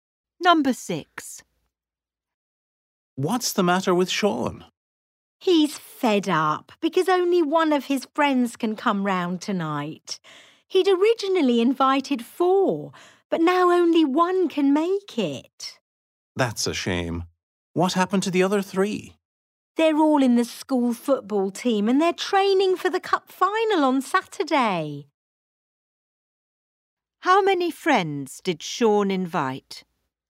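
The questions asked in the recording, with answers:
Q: How many friends did Sean invite?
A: Four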